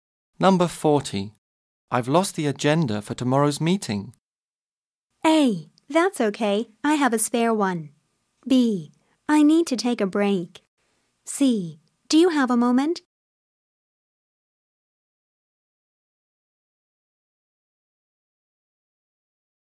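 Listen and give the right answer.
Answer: A: That's okay. I have a spare one.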